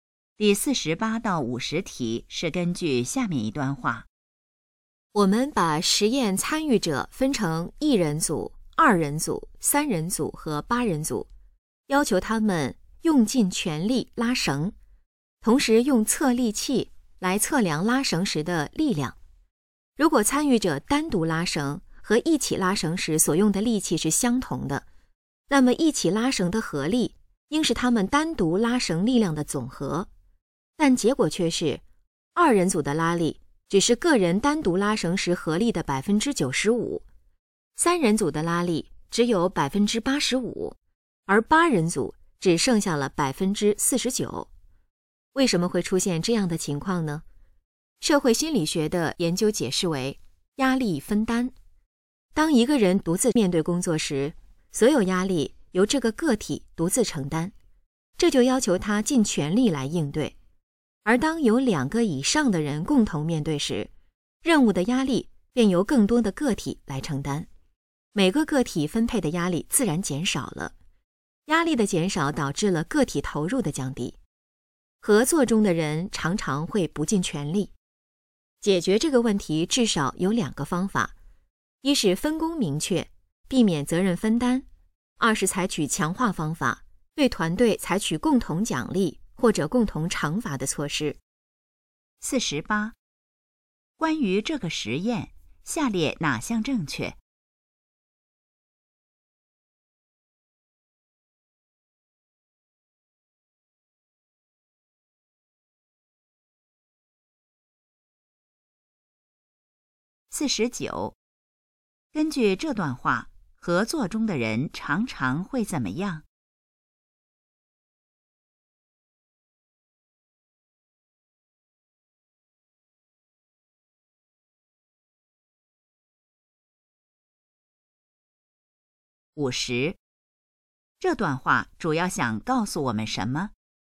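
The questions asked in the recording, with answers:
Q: 根据这段话,合作中的人常常会怎么样?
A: 不尽全力

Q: 这段话主要想告诉我们什么?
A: 合作中压力分担会使人不尽全力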